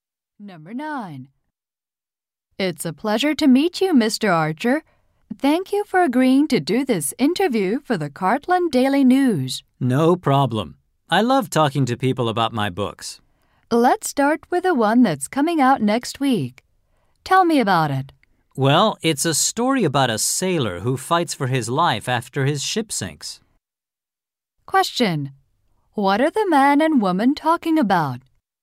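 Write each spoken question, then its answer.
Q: What are the man and woman talking about?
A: The man's new book coming out next week.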